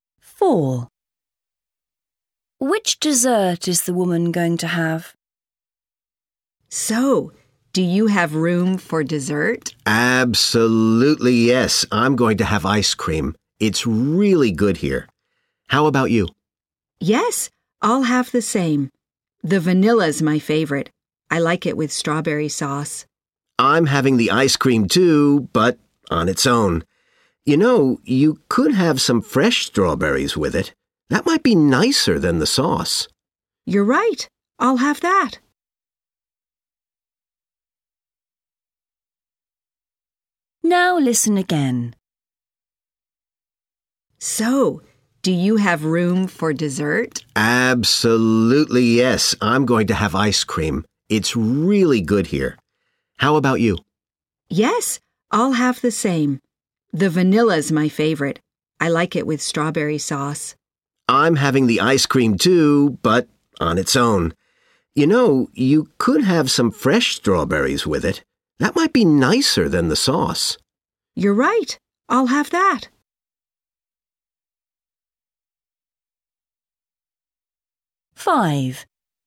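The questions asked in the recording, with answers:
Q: Which dessert is the woman going to have?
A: ice cream with fresh strawberries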